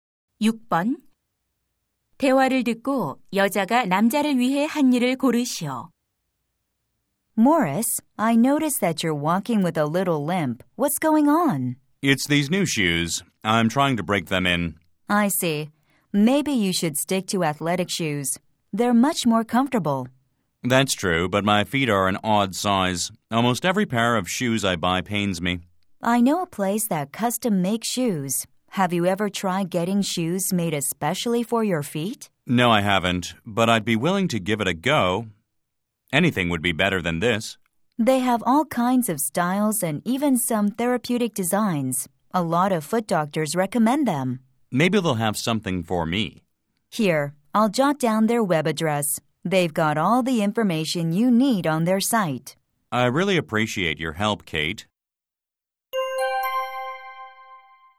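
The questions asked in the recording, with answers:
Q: 대화를 듣고 여자가 남자를 위해 한 일을 고르시오.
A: 맞춤 신발 가게의 웹 주소를 적어 주었다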